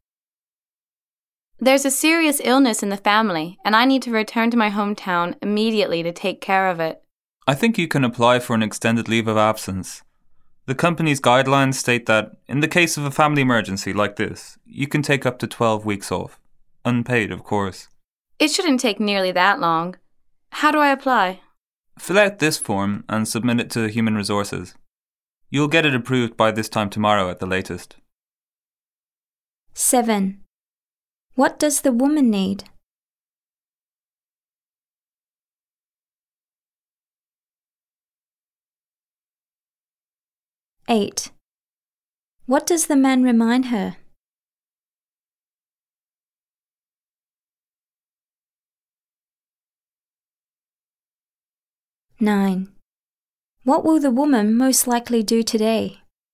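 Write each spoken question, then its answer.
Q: What does the woman need?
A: Time off (a leave of absence) to care for a family member who is seriously ill

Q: What will the woman most likely do today?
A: Fill out a form and submit it to Human Resources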